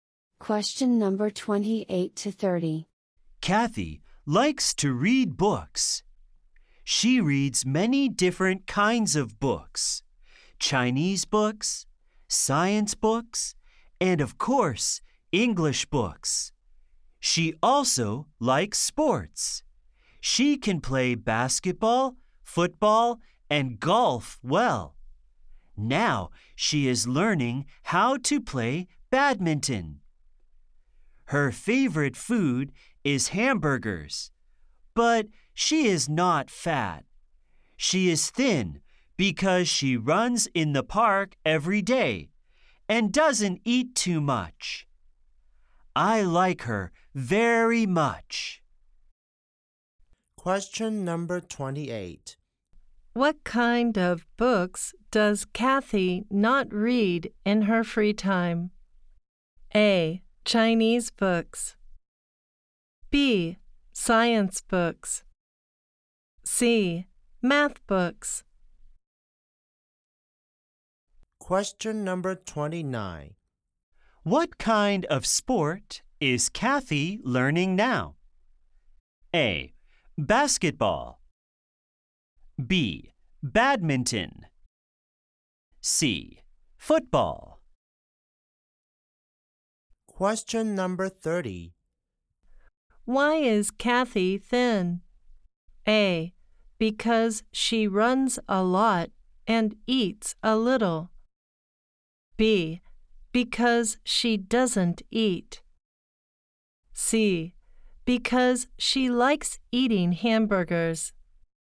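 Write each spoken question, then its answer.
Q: What kind of books does Kathy not read in her free time?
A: C: Math books.

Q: What kind of sport is Kathy learning now?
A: B: Badminton.

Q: Why is Kathy thin?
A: A: Because she runs a lot and eats a little.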